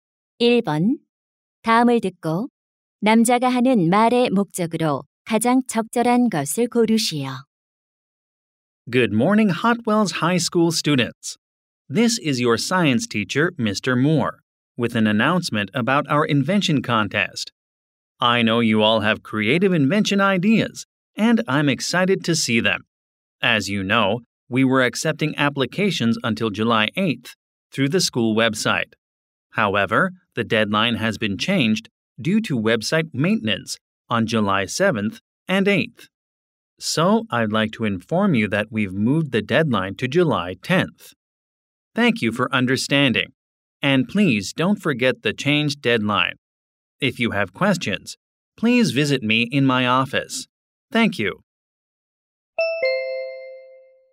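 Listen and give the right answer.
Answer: 발명 대회 신청 마감일 변경을 알리려고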